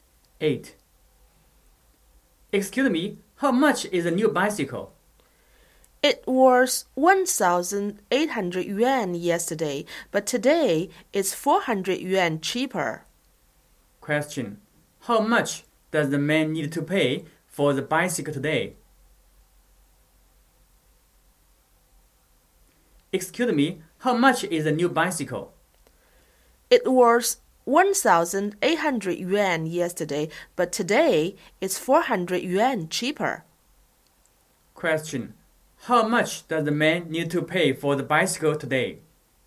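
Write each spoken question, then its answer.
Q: How much does the man need to pay for the bicycle today?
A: 1,400 yuan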